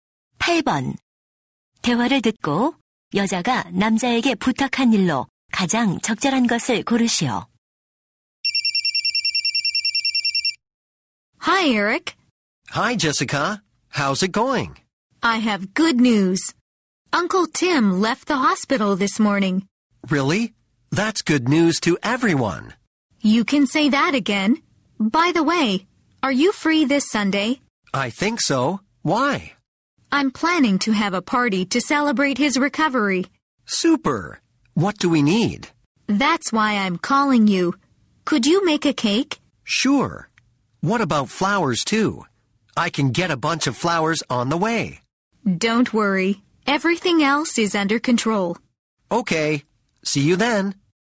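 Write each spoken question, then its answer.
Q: 대화를 듣고 여자가 남자에게 부탁한 일로 가장 적절한 것을 고르시오.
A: 케이크 만들기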